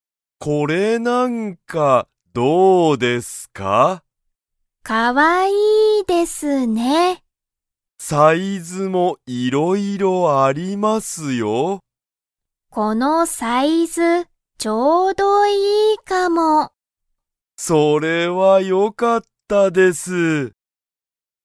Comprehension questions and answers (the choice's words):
ハルは、このサイズが____。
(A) 一番大(いちばんおお)きい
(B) ちょっと小(ちい)さい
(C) いろいろある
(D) ちょうどいいかも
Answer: ちょうどいいかも

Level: Level 1